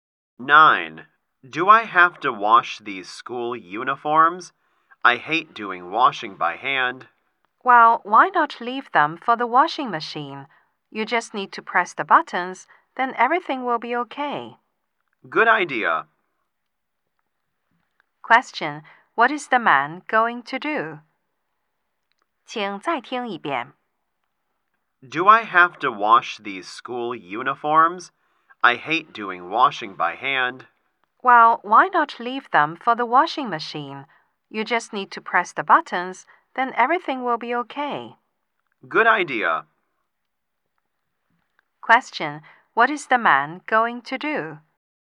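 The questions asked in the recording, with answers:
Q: What is the man going to do?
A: Wash the school uniforms in the washing machine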